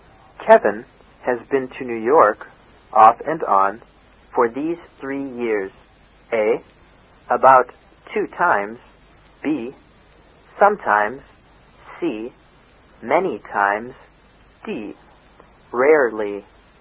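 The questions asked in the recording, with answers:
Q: Kevin has been to New York... off and on, for these 3 years.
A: B: Sometimes.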